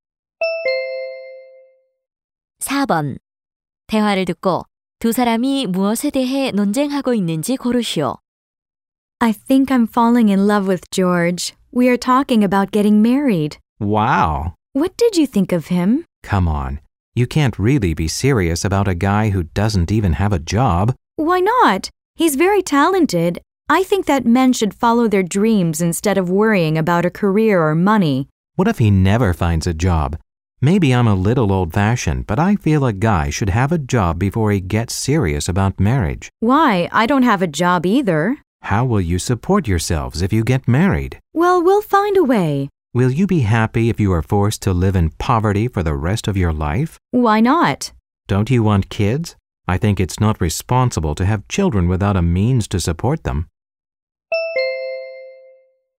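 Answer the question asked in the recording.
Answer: 남자가 결혼 전에 직업이 있어야 하는지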